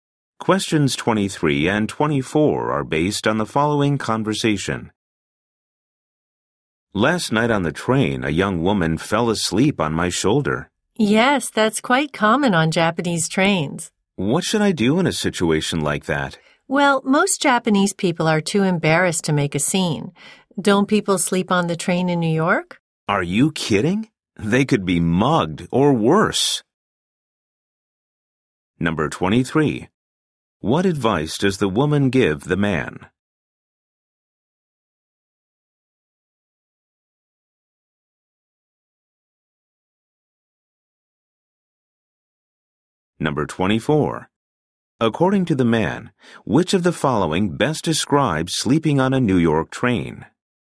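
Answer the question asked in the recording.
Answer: It is dangerous; you could be mugged.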